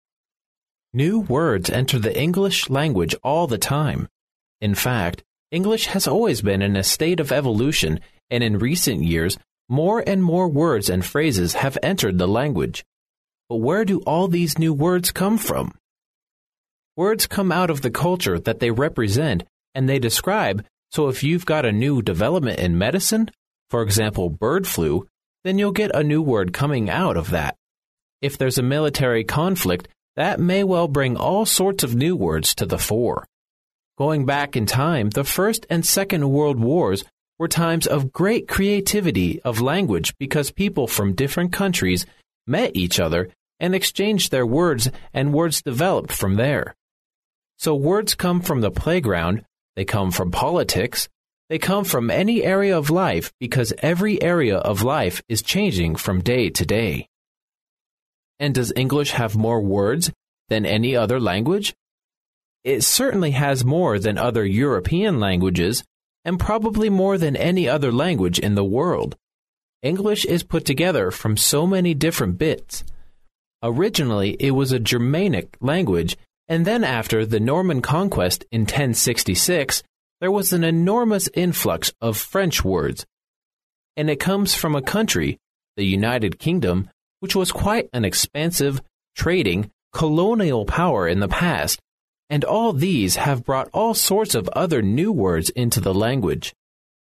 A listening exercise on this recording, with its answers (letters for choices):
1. According to the passage, new words tend to come from ______.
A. world politics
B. advances in science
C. areas of life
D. all the above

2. The passage explains the larger and richer vocabulary of English mainly from a ______ viewpoint.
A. historical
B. cultural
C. commercial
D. colonial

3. According to the passage, which of the following statements best describes the English language?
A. It is outdated in grammar.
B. It accepts new words from science.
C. It has begun taking in new words.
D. It tends to embrace new words.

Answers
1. D
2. A
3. D

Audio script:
[听力原文] New words enter the English language all the time. In fact, English has always been in a state of evolution and in recent years more and more words and phrases have entered the language. But where do all these new words come from? Words come out of the culture that they represent and they describe so if you've got a new development in medicine, for example bird flu, then you'll get a new word coming out of that. If there's a military conflict that may well bring all sorts of new words to the fore. Going back in time the First and Second World Wars were times of great creativity of language because people from different countries met each other and exchanged their words and words developed from there. So words come from the playground; they come from politics; they come from any area of life because every area of life is changing from day to day. And does English have more words than any other language? It certainly has more than other European languages and probably more than any other language in the world. English is put together from so many different bits. Originally it was a Germanic language and then after the Norman Conquest in 1066 there was an enormous influx of French words. And it comes from a country, the United Kingdom, which was quite an expansive, trading, colonial power in the past and all these have brought all sorts of other new words into the language.